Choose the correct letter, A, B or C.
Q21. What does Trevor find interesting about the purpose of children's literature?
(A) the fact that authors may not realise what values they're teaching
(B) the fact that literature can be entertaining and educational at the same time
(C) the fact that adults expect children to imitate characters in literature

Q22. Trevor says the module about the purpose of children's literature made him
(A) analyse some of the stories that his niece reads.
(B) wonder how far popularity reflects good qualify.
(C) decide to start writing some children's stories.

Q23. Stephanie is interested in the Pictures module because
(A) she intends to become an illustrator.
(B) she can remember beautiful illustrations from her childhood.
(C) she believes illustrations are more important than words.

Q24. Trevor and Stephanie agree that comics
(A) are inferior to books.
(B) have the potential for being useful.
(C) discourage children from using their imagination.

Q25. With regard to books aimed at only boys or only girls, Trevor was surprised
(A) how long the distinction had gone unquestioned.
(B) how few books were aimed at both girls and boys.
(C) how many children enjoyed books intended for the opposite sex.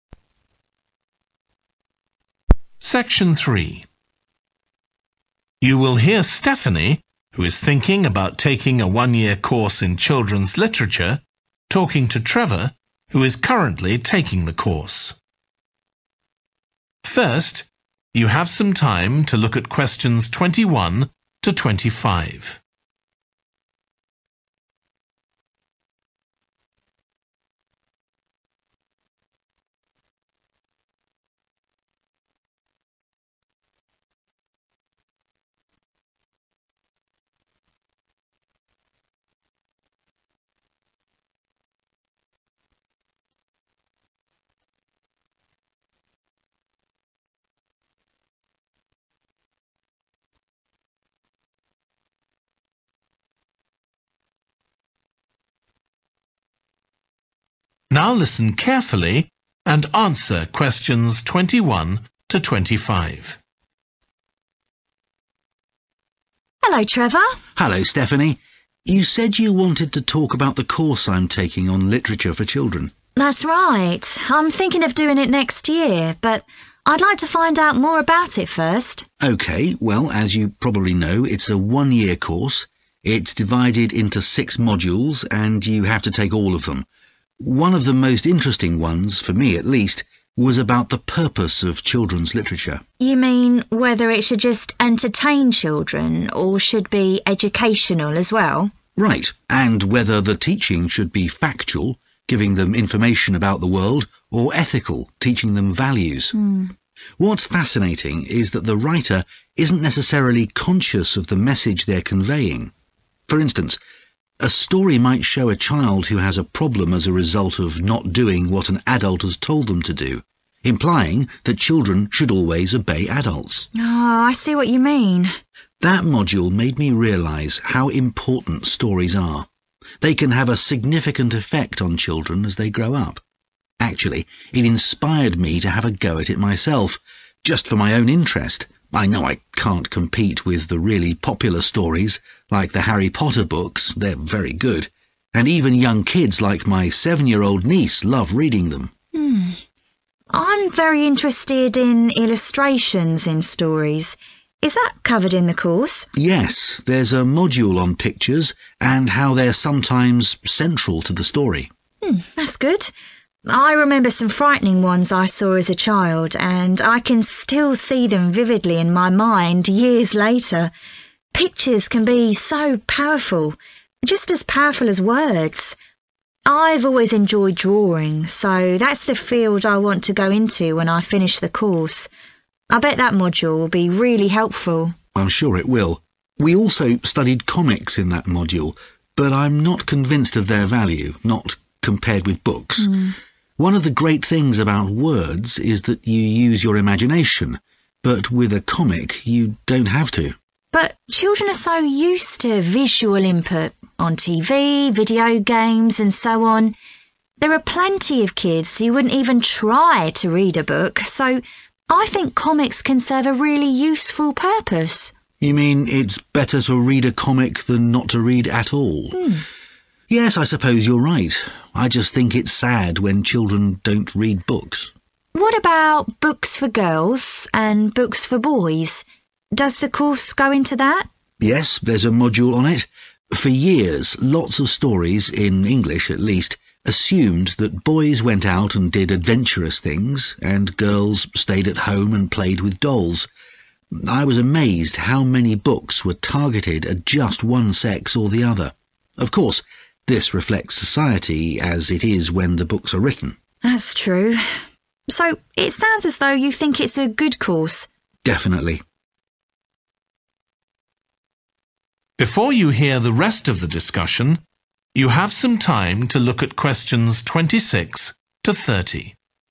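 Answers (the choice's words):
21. the fact that authors may not realise what values they're teaching
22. decide to start writing some children's stories.
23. she intends to become an illustrator.
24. have the potential for being useful.
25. how few books were aimed at both girls and boys.

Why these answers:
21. Right, and whether the teaching should be factual – giving them information about the world – or ethical, teaching them values. What's fascinating is that the writer isn't necessarily conscious of the message they're conveying [Điều thú vị là người viết không nhất thiết phải ý thức được thông điệp mà họ đang truyền tải]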